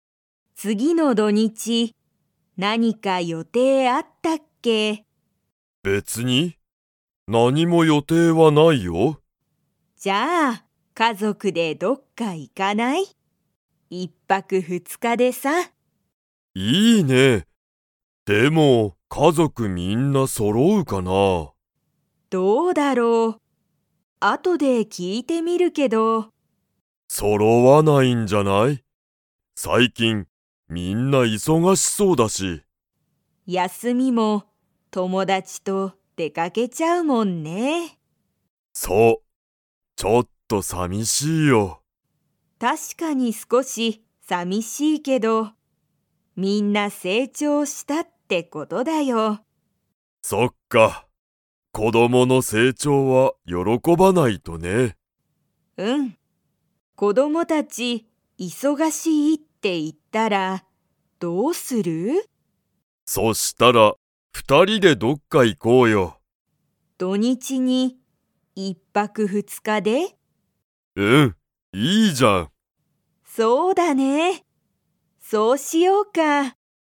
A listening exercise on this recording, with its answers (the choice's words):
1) 夫おっとは、次つぎの土日どにちに家族かぞくがみんな と思おもっている。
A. 揃そろう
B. 揃そろわない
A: 揃そろわない

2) 子供こどもはみんな、休やすみに誰だれと出でかけますか?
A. 家族かぞく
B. 彼女かのじょ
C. 友達ともだち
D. 先輩せんぱい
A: 友達ともだち

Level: Level 4